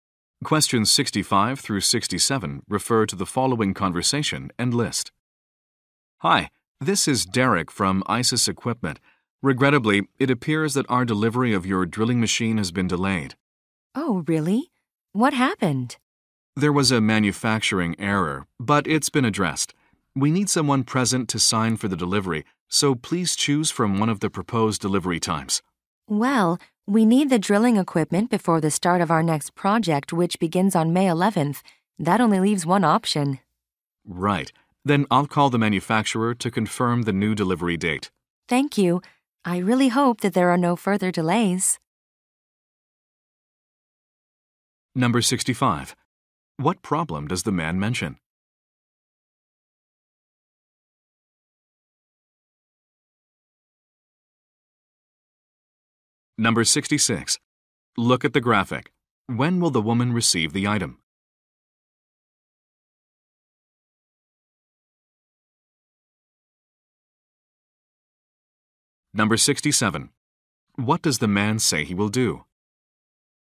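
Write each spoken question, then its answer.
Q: What problem does the man mention?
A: The delivery has been delayed by a manufacturing error

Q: What does the man say he will do?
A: Call the manufacturer to confirm the new delivery date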